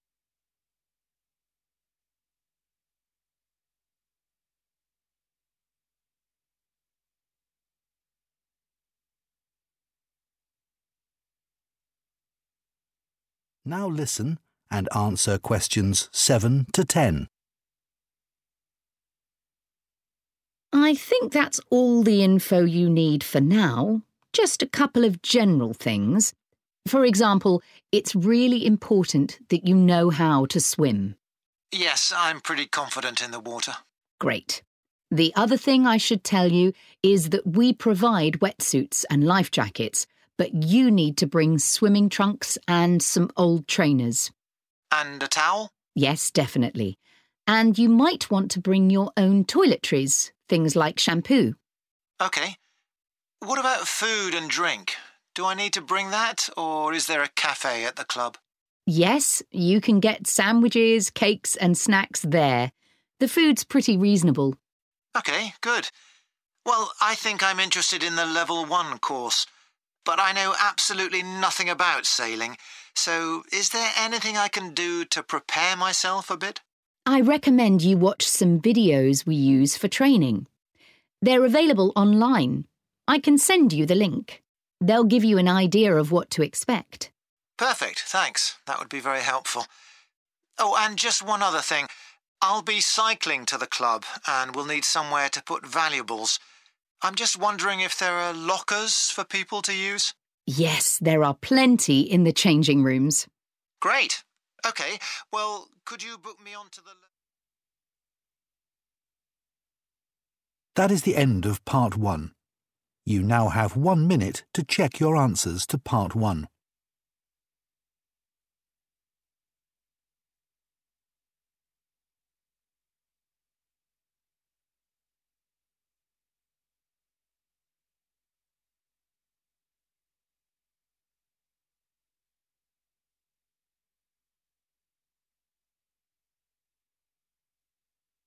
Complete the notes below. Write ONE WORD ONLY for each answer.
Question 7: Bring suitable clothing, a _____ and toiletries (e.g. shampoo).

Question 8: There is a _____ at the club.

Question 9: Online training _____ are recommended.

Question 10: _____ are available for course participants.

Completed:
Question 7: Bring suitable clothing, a towel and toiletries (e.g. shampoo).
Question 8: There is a café / cafe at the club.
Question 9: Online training videos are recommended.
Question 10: Lockers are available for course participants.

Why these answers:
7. The correct answer is "towel" because when the man asks if he should bring one, the woman says "definitely." This shows it is one of the items he needs to provide for himself, along with the clothes (swimming trunks and trainers) and toiletries (shampoo) mentioned in the conversation.
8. The correct answer is 'café' because the man asks if the club has a place to buy food or if he needs to bring his own. The woman says 'Yes' and describes the snacks and sandwiches he can find there. Keywords such as 'food', 'drink', and 'snacks' help identify that he is talking about a café.
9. The correct answer is videos because the woman advises the man to watch specific training recordings available on the internet (online) before he starts his Level 1 course. This helps him prepare. Important keywords to look for are 'recommend' (which means to suggest) and 'online'.
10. The correct answer is confirmed at the end of the conversation when the man asks for a place to put his 'valuables' (expensive items) because he is cycling. The woman answers that there are 'plenty' of lockers to use. This matches the sentence in the notes which says they are 'available' for participants.

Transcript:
WOMAN: I think that's all the info you need for now. Just a couple of general things. For example, it's really important that you know how to swim.
MAN: Yes, I'm pretty confident in the water.
WOMAN: Great. The other thing I should tell you is that we provide wetsuits and life jackets but you need to bring swimming trunks and some old trainers.
MAN: And a towel?
WOMAN: Yes definitely. And you might want to bring your own toiletries, things like shampoo.
MAN: OK. What about food and drink? Do I need to bring that or is there a café at the club?
WOMAN: Yes, you can get sandwiches, cakes and snacks there. The food's pretty reasonable.
MAN: OK good. Well I think I'm interested in the Level 1 course. But I know absolutely nothing about sailing so is there anything I can do to prepare myself a bit?
WOMAN: I recommend you watch some videos we use for training. They're available online. I can send you the link. They'll give you an idea of what to expect.
MAN: Perfect, thanks. That would be very helpful. Oh and just one other thing - I'll be cycling to the club and will need somewhere to put valuables. I'm just wondering if there are lockers for people to use?
WOMAN: Yes, there are plenty in the changing rooms.
MAN: Great. OK well could you book me onto...